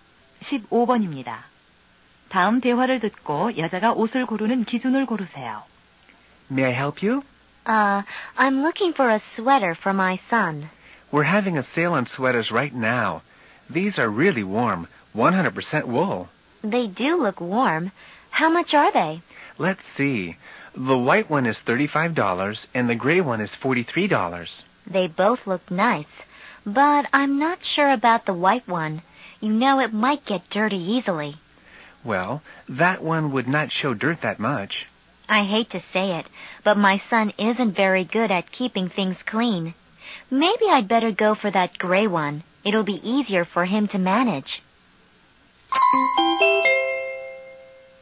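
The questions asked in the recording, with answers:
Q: 다음 대화를 듣고 여자가 옷을 고르는 기준을 고르세요.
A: 때가 잘 타지 않는 것(관리의 편리함)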